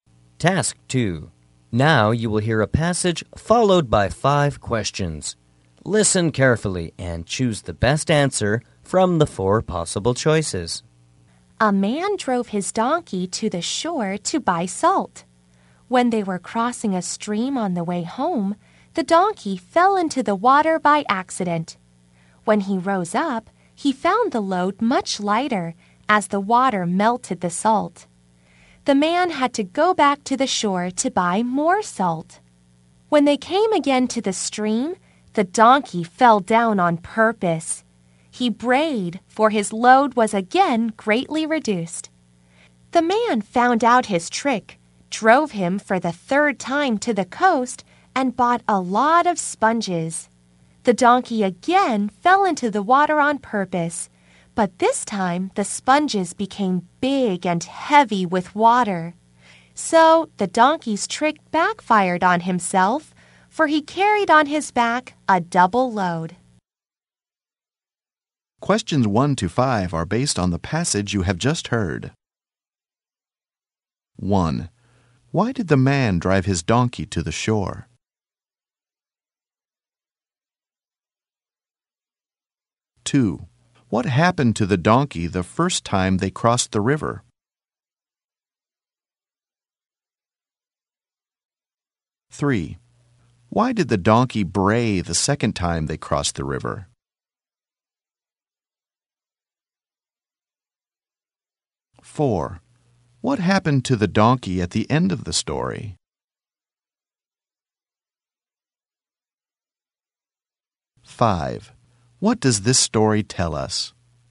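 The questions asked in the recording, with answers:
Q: Why did the man drive his donkey to the shore?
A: To buy salt.

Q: What happened to the donkey the first time they crossed the river?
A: It fell into the water by accident and the salt melted, so its load got lighter.

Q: Why did the donkey bray the second time they crossed the river?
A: Its load was greatly reduced again.

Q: What happened to the donkey at the end of the story?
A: The sponges soaked up water, so it carried a double load.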